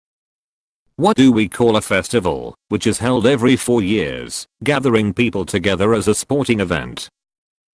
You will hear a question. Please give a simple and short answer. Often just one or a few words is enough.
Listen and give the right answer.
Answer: The Olympic games